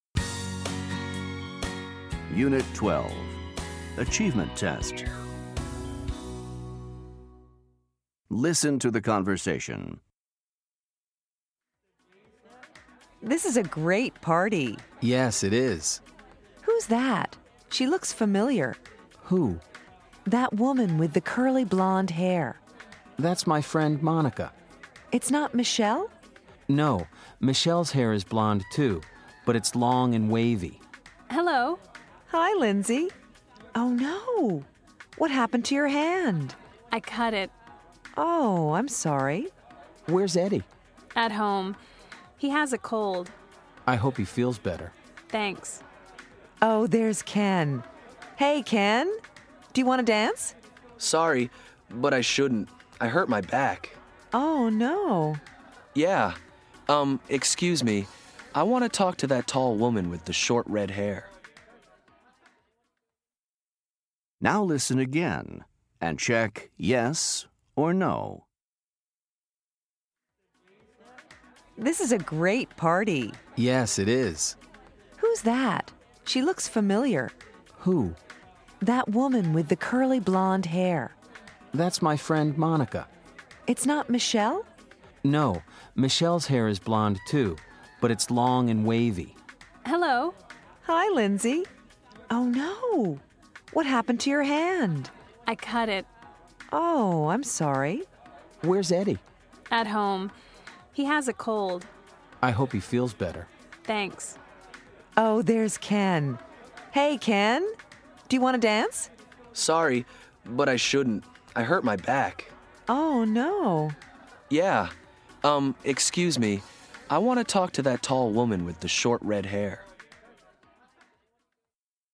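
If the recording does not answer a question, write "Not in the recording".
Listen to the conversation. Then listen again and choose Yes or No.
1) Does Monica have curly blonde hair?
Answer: Yes

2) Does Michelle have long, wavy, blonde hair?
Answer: Yes

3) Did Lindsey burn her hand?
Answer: No

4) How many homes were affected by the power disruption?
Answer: Not in the recording

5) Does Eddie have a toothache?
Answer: No

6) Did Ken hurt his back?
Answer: Yes

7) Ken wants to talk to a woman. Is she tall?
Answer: Yes

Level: Top Notch Fundamentals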